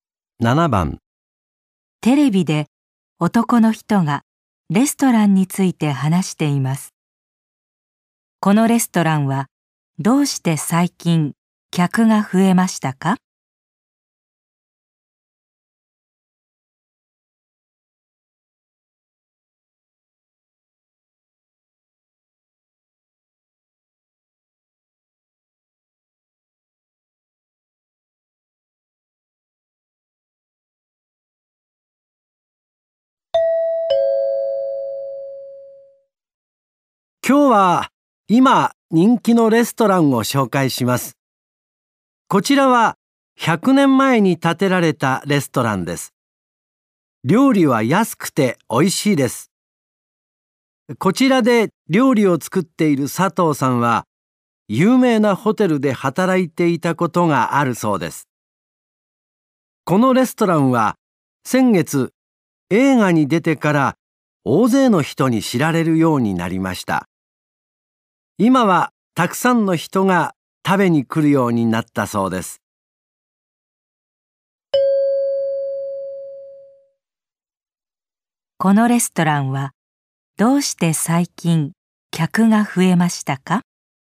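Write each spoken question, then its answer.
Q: このレストランはどうして最近客が増えましたか?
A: 先月映画に出たから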